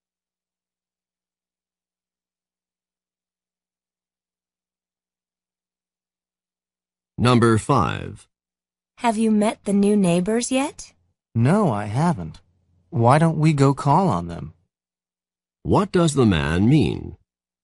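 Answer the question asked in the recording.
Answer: They should go and visit the new neighbors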